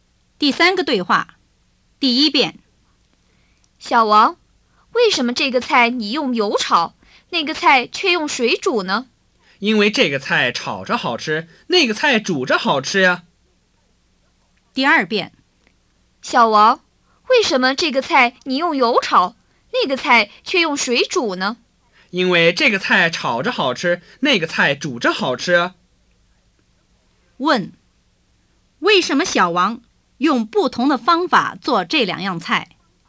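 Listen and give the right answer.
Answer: 因为这个菜炒着好吃,那个菜煮着好吃。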